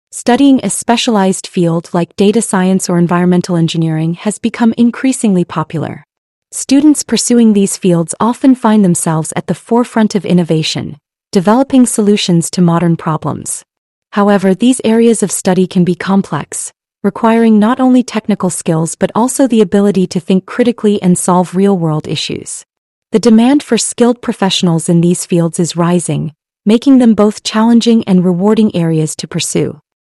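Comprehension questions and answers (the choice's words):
Listen and Answer:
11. What is one challenge mentioned for students in specialized fields of study?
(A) Overcoming real-world issues without any technical knowledge.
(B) Balancing academic studies with personal time.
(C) Developing critical and problem-solving skills.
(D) Navigating through a lack of career opportunities.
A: Developing critical and problem-solving skills.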